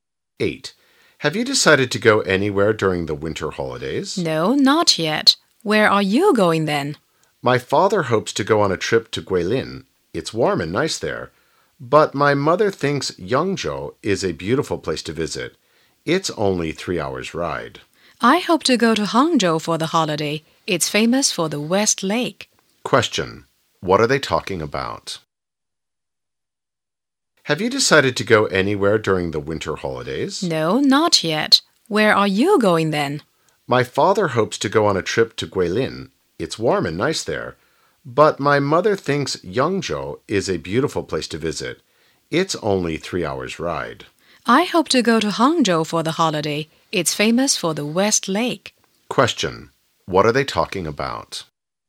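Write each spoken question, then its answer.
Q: What are they talking about?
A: Where to go during the winter holidays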